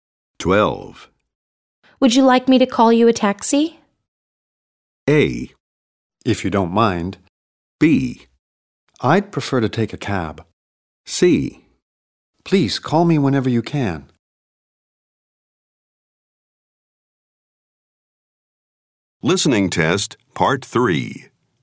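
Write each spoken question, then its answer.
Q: Would you like me to call you a taxi?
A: A: If you don't mind.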